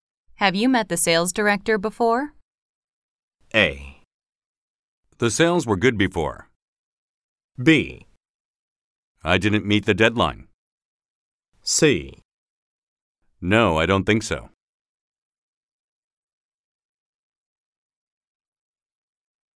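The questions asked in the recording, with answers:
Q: Have you met the sales director before?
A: C: No, I don't think so.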